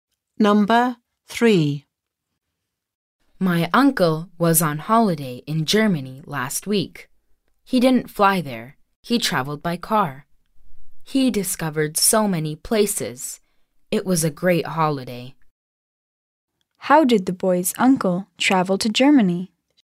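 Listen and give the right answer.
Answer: By car.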